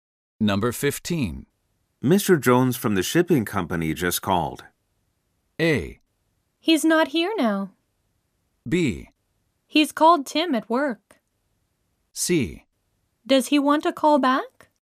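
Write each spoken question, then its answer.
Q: Mr. Jones from the shipping company just called.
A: C: Does he want a call back?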